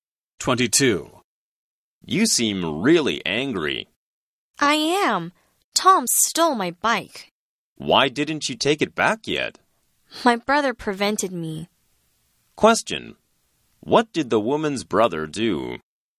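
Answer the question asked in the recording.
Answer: He stopped her from taking her bike back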